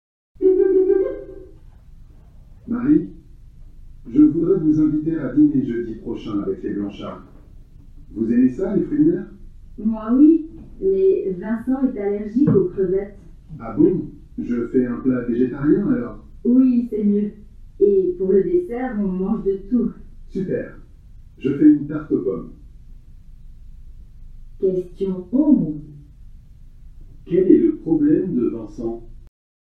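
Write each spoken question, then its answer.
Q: Quel est le problème de Vincent?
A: Il est allergique aux crevettes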